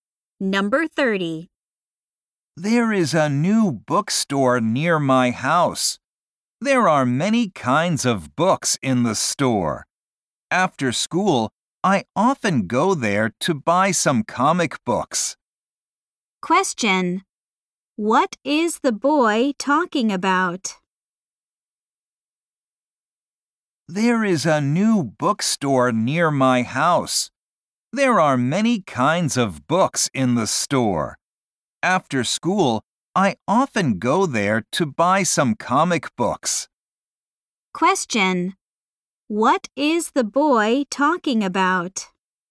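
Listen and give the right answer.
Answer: A new bookstore near his house.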